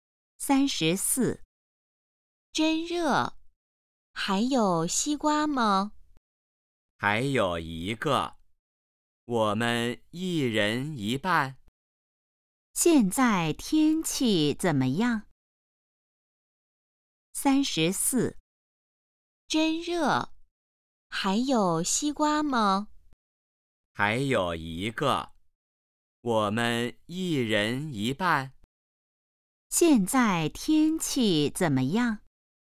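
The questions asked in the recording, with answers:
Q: 现在天气怎么样?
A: 很热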